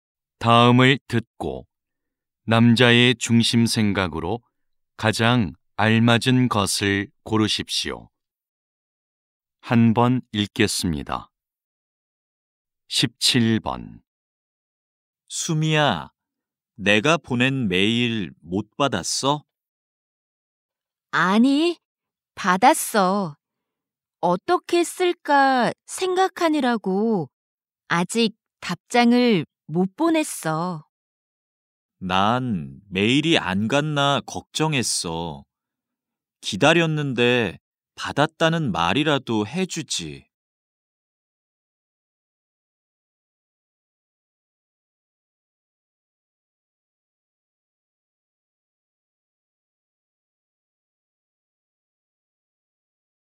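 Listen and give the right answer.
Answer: 메일을 받았으면 받았다는 답이라도 바로 해 주어야 한다.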